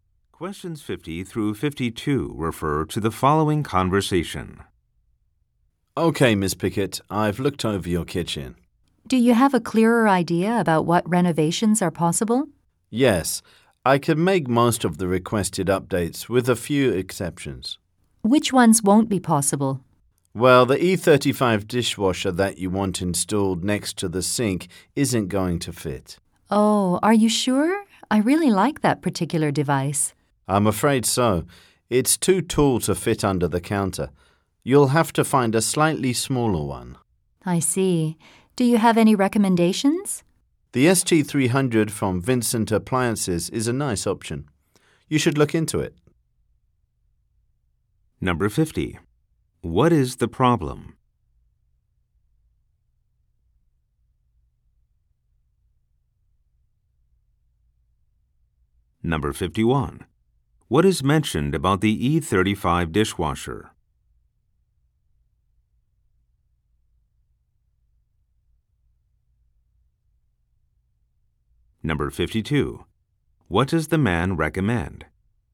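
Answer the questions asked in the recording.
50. The dishwasher she wants won't fit
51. It is too tall to fit under the counter
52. Looking into the ST300 from Vincent Appliances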